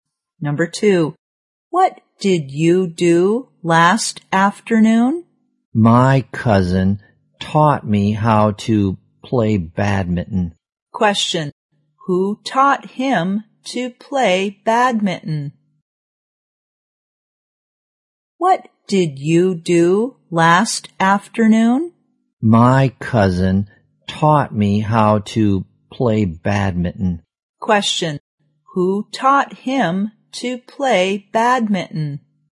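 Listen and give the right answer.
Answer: His cousin.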